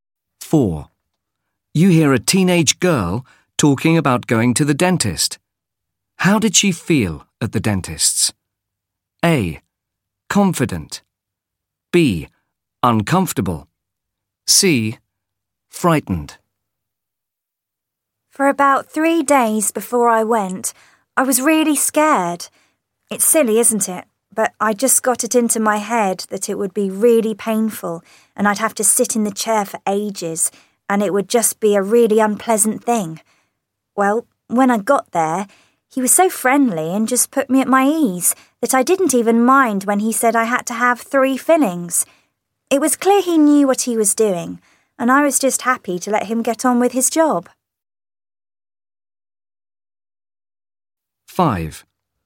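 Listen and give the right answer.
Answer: A: Confident.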